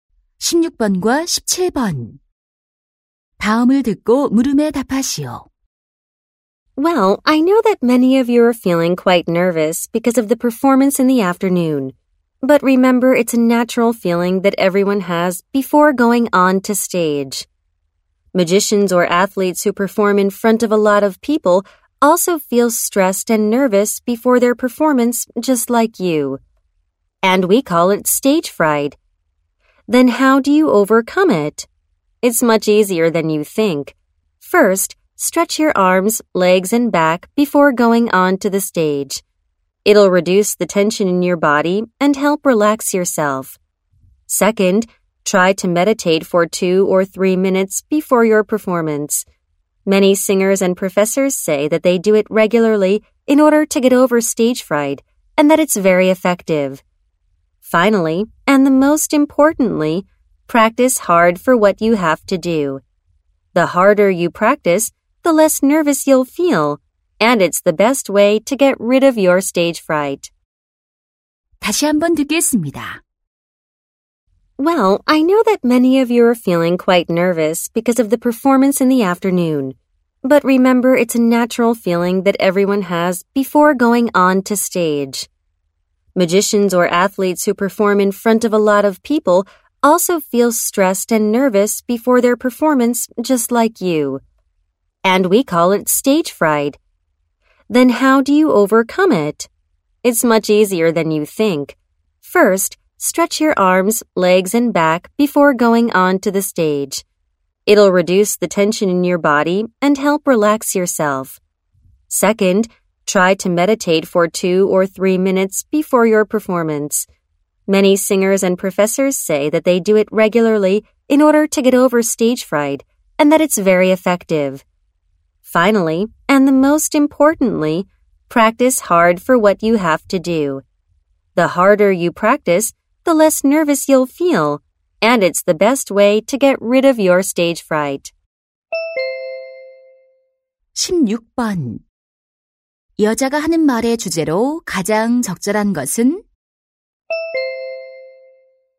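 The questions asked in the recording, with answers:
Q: 여자가 하는 말의 주제로 가장 적절한 것은?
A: 무대 공포증을 극복하는 방법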